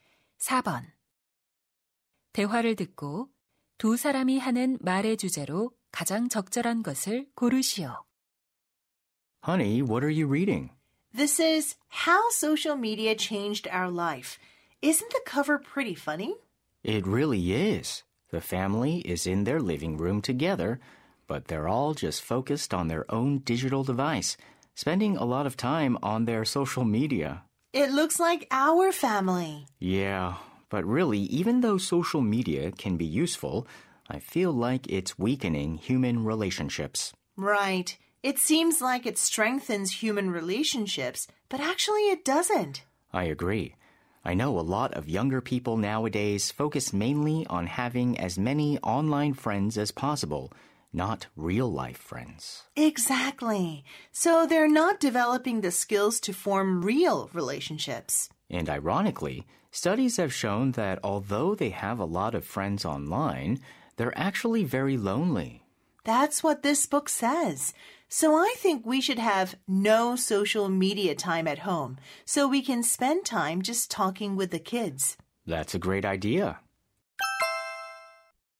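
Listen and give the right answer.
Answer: 소셜 미디어가 인간관계를 약화시킨다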